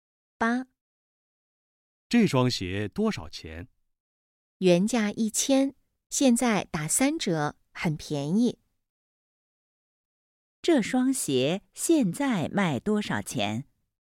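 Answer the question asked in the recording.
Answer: 300元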